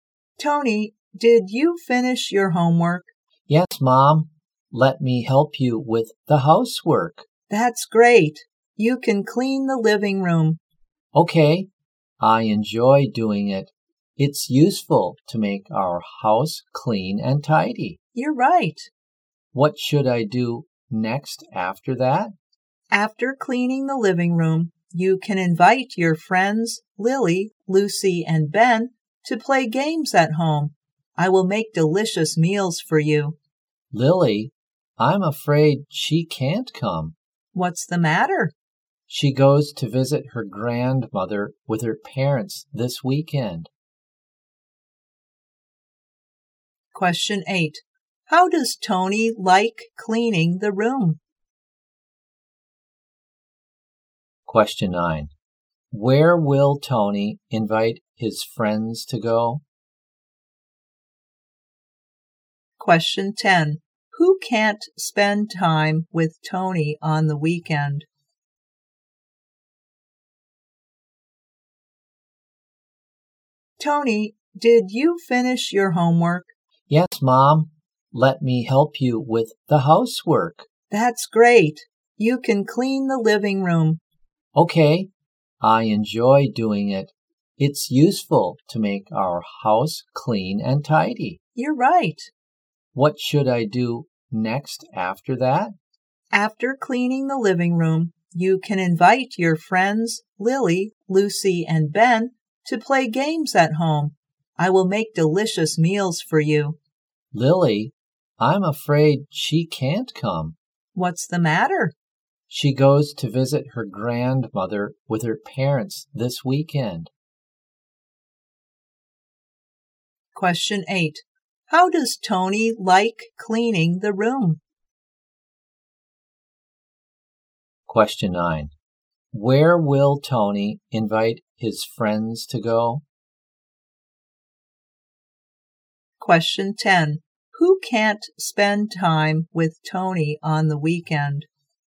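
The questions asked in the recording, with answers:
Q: Question 8. How does Tony like cleaning the room?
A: He enjoys it

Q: Question 9. Where will Tony invite his friends to go?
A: To his home

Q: Question 10. Who can't spend time with Tony on the weekend?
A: Lily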